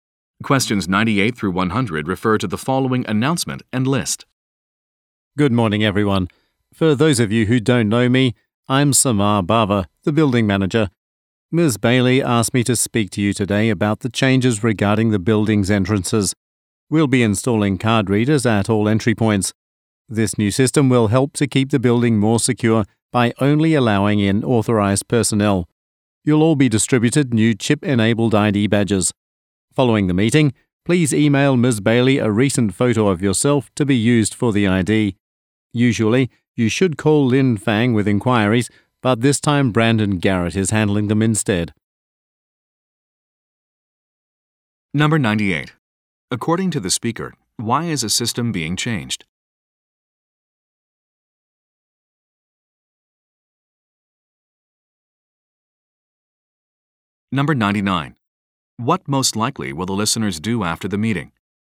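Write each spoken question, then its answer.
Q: According to the speaker, why is a system being changed?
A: To make the building more secure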